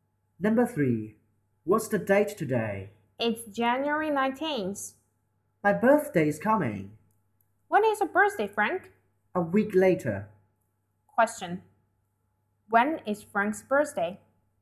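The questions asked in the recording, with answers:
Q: When is Frank's birthday?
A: January 26th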